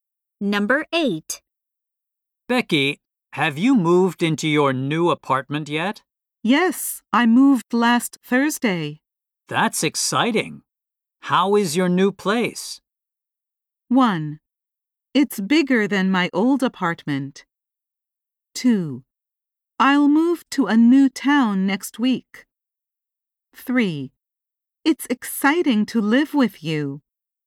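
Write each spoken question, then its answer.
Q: That's exciting. How is your new place?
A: 1: It's bigger than my old apartment.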